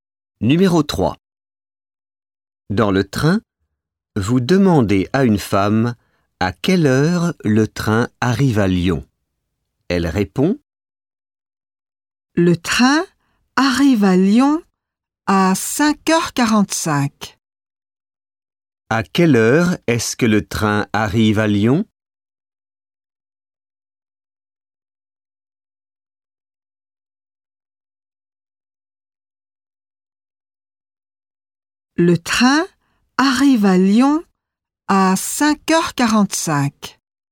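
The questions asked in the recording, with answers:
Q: À quelle heure est-ce que le train arrive à Lyon?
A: à 5h45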